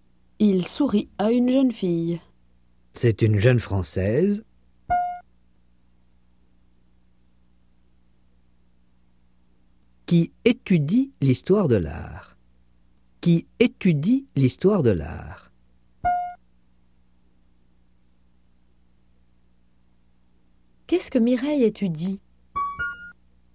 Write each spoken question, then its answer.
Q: Qu'est-ce que Mireille étudie ?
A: L'histoire de l'art.